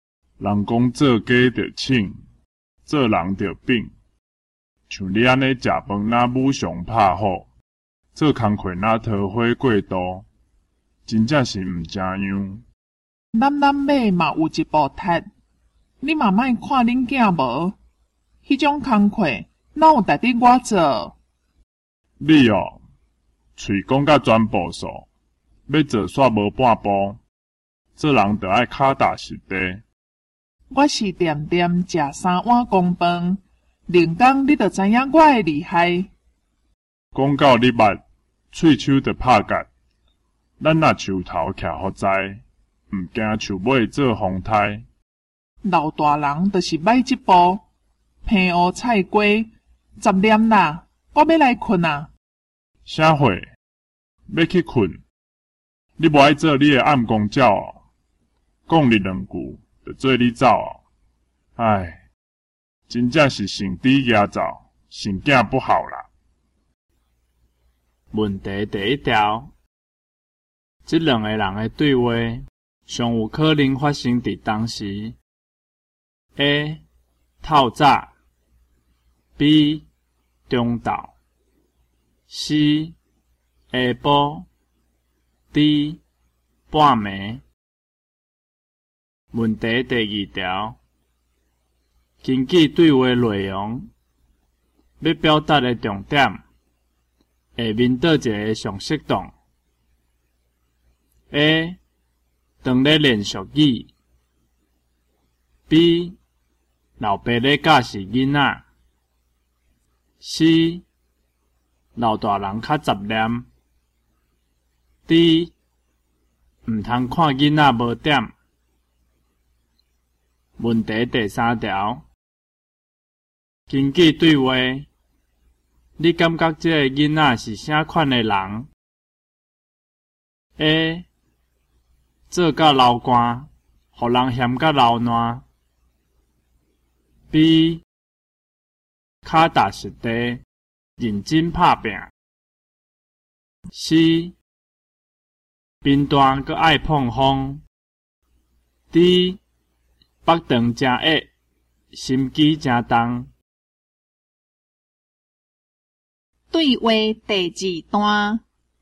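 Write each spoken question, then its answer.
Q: 根据对话,你感觉这个囡仔是啥款的人 ?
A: C: 贫惰阁爱碰风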